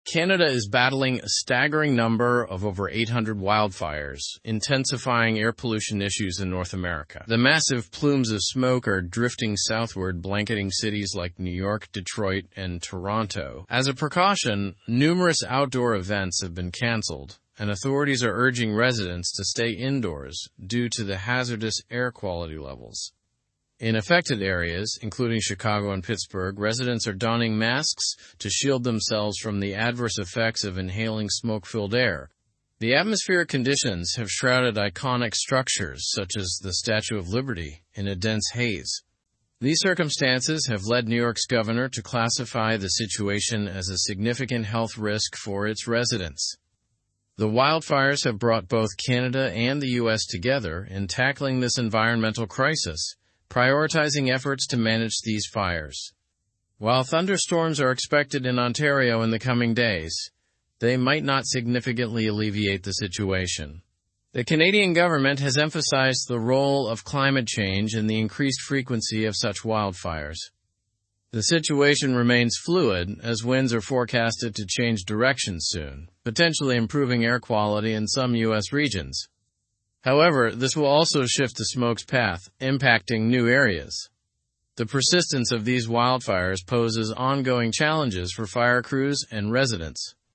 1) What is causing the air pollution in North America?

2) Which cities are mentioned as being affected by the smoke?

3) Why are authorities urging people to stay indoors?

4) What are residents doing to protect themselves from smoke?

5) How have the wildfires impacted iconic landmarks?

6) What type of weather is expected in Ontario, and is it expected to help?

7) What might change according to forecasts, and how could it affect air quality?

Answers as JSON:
{"1": "The air pollution is caused by over 800 wildfires in Canada.", "2": "New York, Detroit, and Toronto are mentioned as being affected.", "3": "Authorities urge people to stay indoors because of hazardous air quality levels.", "4": "Residents are wearing masks to protect themselves from smoke.", "5": "The wildfires have shrouded iconic structures like the Statue of Liberty in haze.", "6": "Thunderstorms are expected in Ontario, but they might not significantly help.", "7": "Forecasts suggest wind direction might change, potentially improving air quality in some regions but impacting new areas."}

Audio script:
Canada is battling a staggering number of over 800 wildfires, intensifying air pollution issues in North America. The massive plumes of smoke are drifting southward, blanketing cities like New York, Detroit, and Toronto. As a precaution, numerous outdoor events have been canceled, and authorities are urging residents to stay indoors due to the hazardous air quality levels.
In affected areas, including Chicago and Pittsburgh, residents are donning masks to shield themselves from the adverse effects of inhaling smoke-filled air. The atmospheric conditions have shrouded iconic structures such as the Statue of Liberty in a dense haze. These circumstances have led New York's governor to classify the situation as a significant health risk for its residents.
The wildfires have brought both Canada and the US together in tackling this environmental crisis, prioritizing efforts to manage these fires. While thunderstorms are expected in Ontario in the coming days, they might not significantly alleviate the situation. The Canadian government has emphasized the role of climate change in the increased frequency of such wildfires.
The situation remains fluid as winds are forecasted to change direction soon, potentially improving air quality in some US regions. However, this will also shift the smoke's path, impacting new areas. The persistence of these wildfires poses ongoing challenges for fire crews and residents.

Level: Level 3